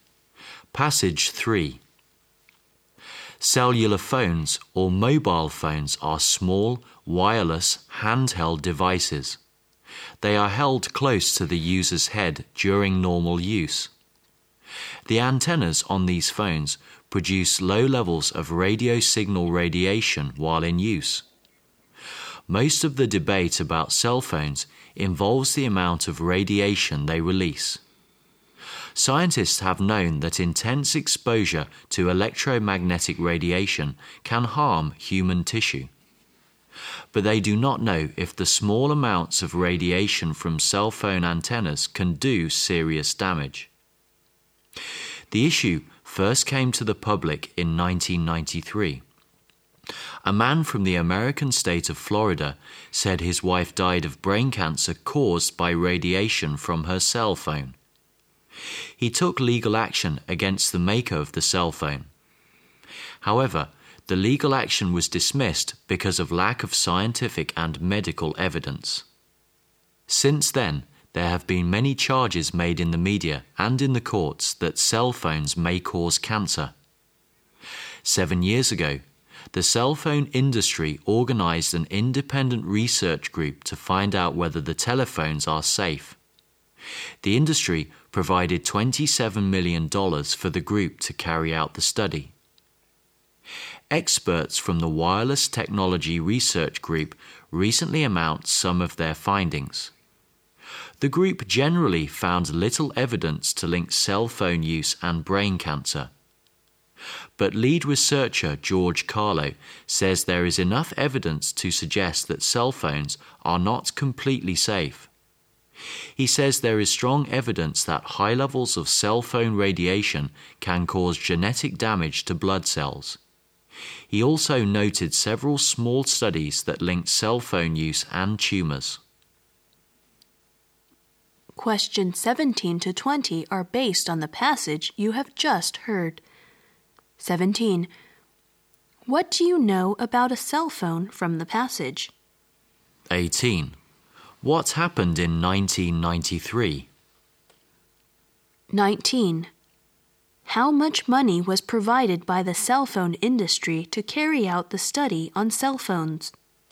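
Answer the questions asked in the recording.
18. A Florida man took legal action against a cell phone maker, saying his wife died of brain cancer caused by her cell phone
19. $27 million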